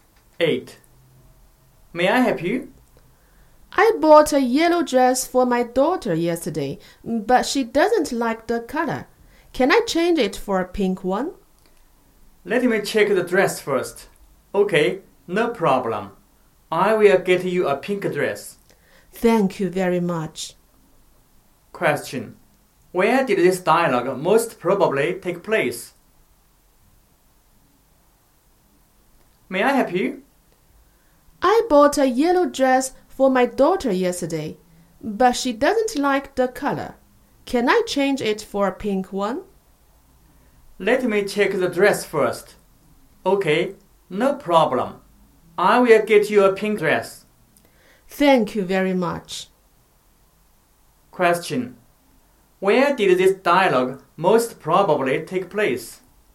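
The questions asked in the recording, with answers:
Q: Where did this dialogue most probably take place?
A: In a clothes shop.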